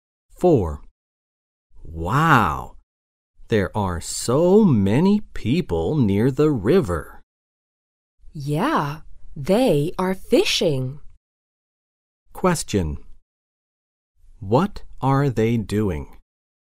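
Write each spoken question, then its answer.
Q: What are they doing?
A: Fishing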